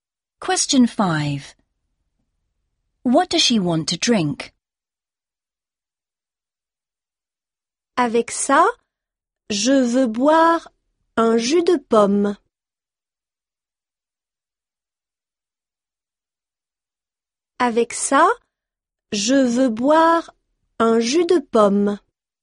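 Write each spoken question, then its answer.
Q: What does she want to drink?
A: Apple juice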